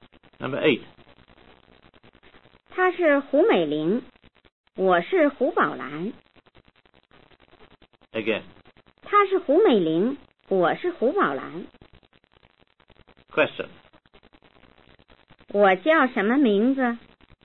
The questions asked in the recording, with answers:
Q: 我叫什么名字?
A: 你叫宝兰。